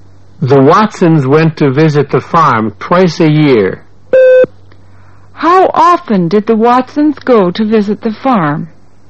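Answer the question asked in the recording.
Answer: Twice a year.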